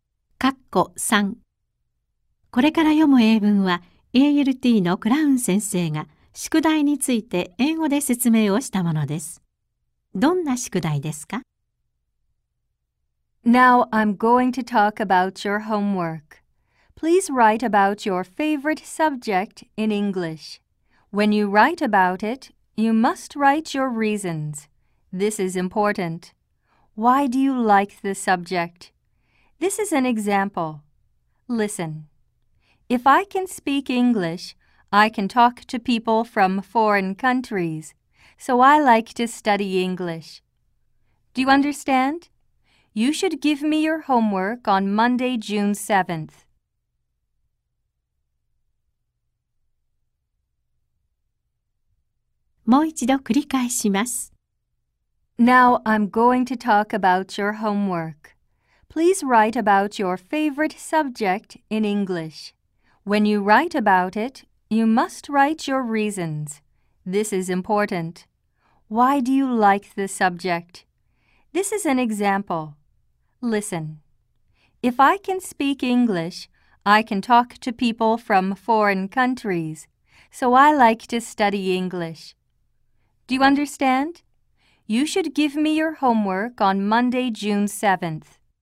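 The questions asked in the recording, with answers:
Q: どんな宿題ですか?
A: 好きな教科について理由を含めて英語で書く宿題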